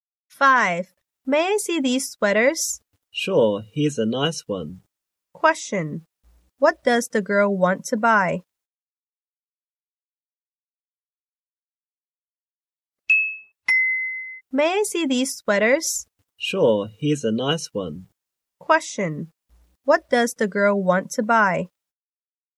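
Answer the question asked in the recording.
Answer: A sweater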